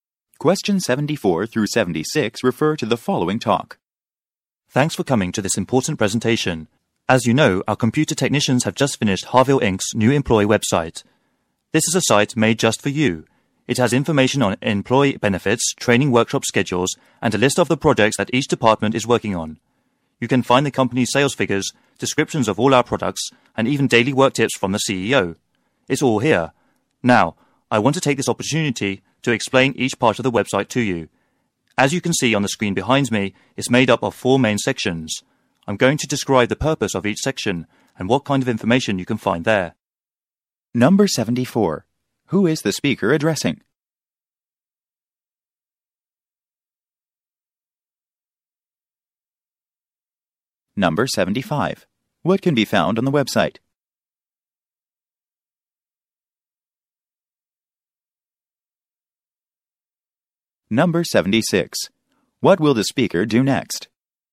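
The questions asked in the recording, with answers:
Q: Who is the speaker addressing?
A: Employees of Harville Inc.

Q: What can be found on the website?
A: Employee benefits, training schedules, project lists, sales figures, product descriptions and daily work tips

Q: What will the speaker do next?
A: Explain each of the website's four sections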